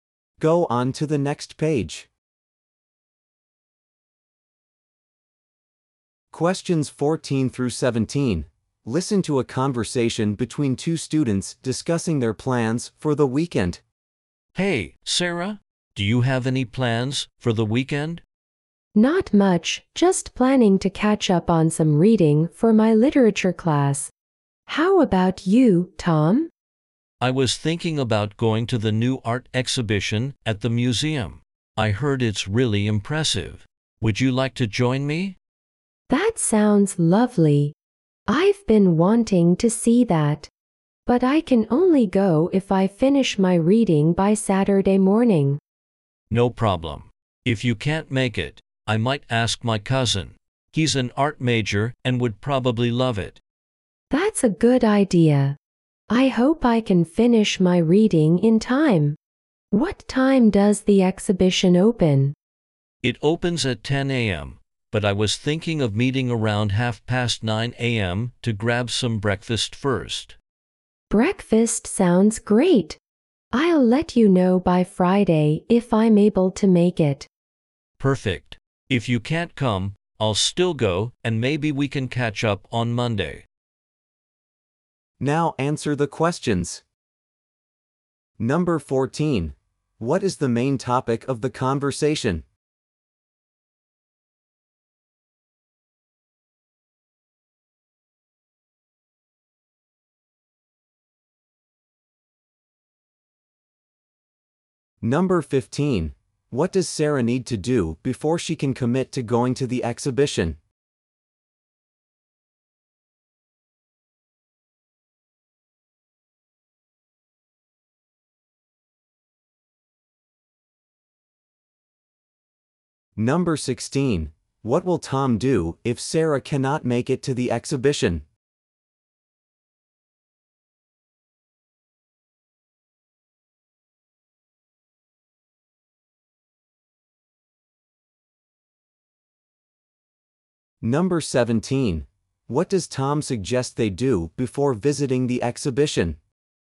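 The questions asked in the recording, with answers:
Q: What is the main topic of the conversation?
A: Their weekend plans

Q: What does Sarah need to do before she can commit to going to the exhibition?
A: Finish her reading by Saturday morning

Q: What will Tom do if Sarah cannot make it to the exhibition?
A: Ask his cousin

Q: What does Tom suggest they do before visiting the exhibition?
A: Have breakfast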